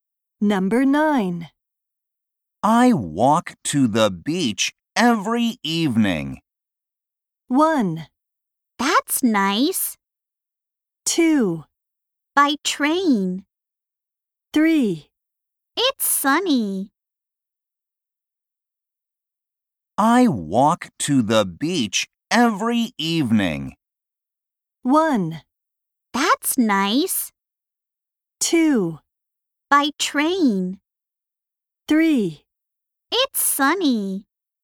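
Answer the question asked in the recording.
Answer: 1: That's nice.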